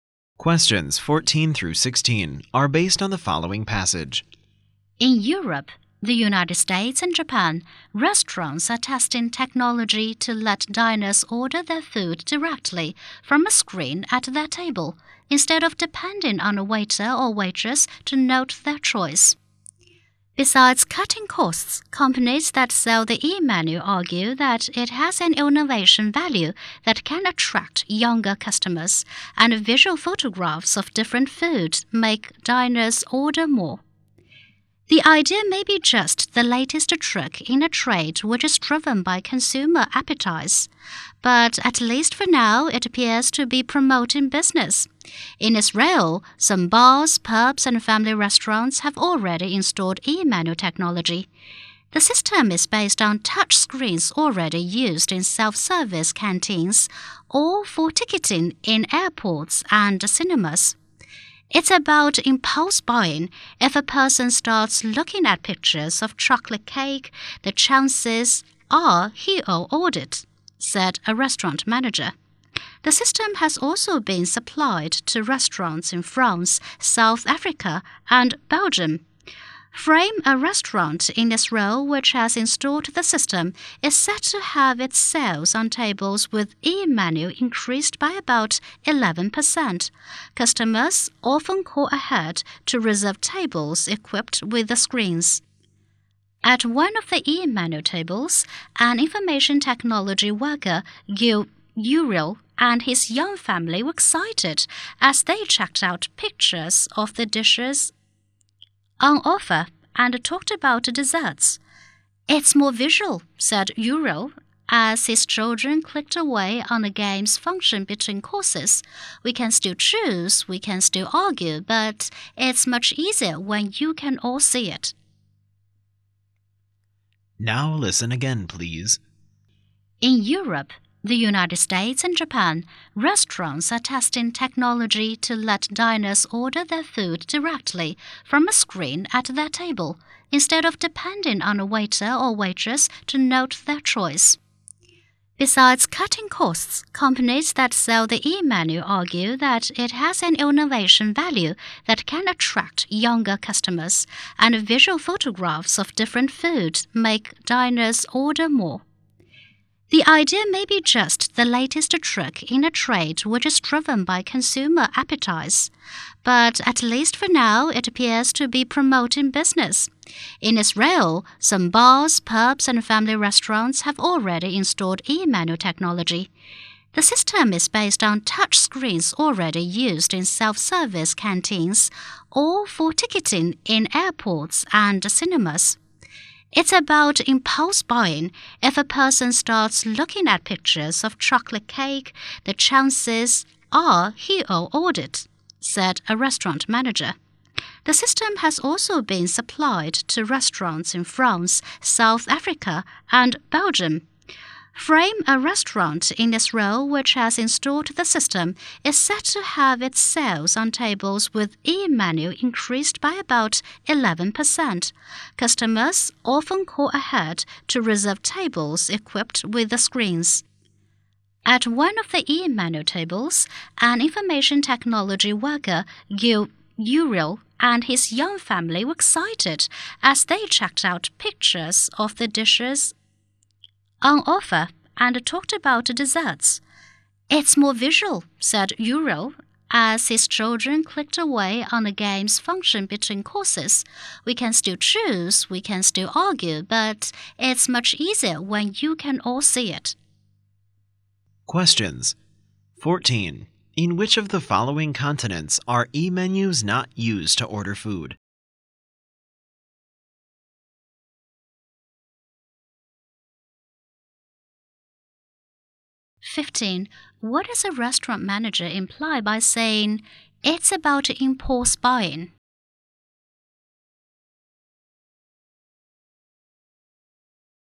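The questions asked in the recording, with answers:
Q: What does a restaurant manager imply by saying, "It's about impulse buying"?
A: Seeing pictures of food makes diners order more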